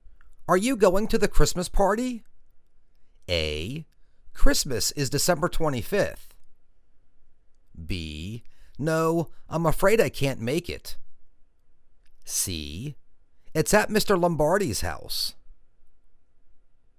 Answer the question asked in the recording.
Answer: No, I'm afraid I can't make it.